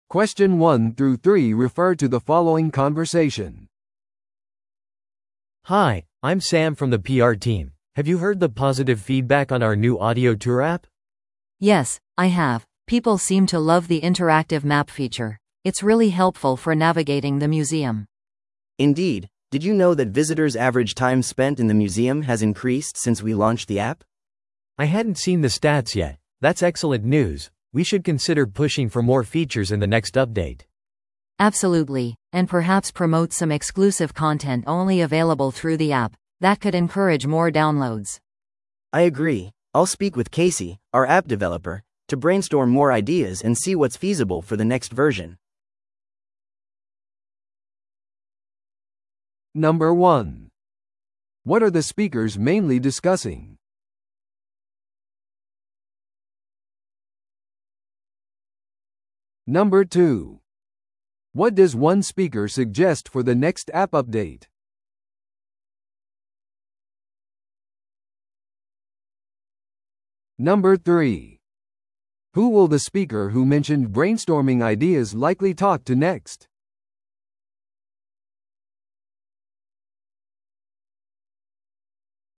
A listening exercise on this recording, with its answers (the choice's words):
Listen to the audio below and answer the questions.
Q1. What are the speakers mainly discussing?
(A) 新しい広告戦略の実装。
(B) 博物館のオーディオツアーアプリに対するフィードバック。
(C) 博物館のハードウェアのアップグレード。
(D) 予定されている展示会の計画。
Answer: 博物館のオーディオツアーアプリに対するフィードバック。

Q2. What does one speaker suggest for the next app update?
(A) バーチャルツアーガイドの追加。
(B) アプリのダウンロード価格を上げる。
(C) より多くのインタラクティブ機能を取り入れる。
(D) 展示数を減らす。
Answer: より多くのインタラクティブ機能を取り入れる。

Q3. Who will the speaker who mentioned brainstorming ideas likely talk to next?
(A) 博物館の館長。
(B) PRチームのリーダー。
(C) アプリ開発者のケーシー。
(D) フィードバックのための来館者。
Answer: アプリ開発者のケーシー。

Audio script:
A: Hi, I'm Sam from the PR team. Have you heard the positive feedback on our new audio tour app?
B: Yes, I have. People seem to love the interactive map feature. It's really helpful for navigating the museum.
C: Indeed. Did you know that visitors' average time spent in the museum has increased since we launched the app?
A: I hadn't seen the stats yet. That's excellent news! We should consider pushing for more features in the next update.
B: Absolutely, and perhaps promote some exclusive content only available through the app. That could encourage more downloads.
C: I agree. I'll speak with Casey, our app developer, to brainstorm more ideas and see what's feasible for the next version.